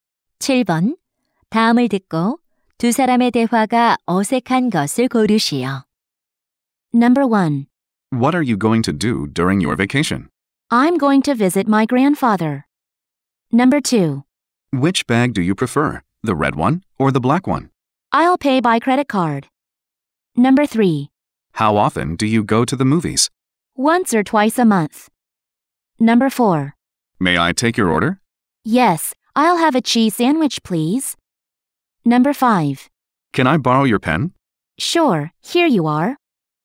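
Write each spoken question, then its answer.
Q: 다음을 듣고 두 사람의 대화가 어색한 것을 고르시오.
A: 2: Which bag do you prefer, the red one or the black one? / I'll pay by credit card.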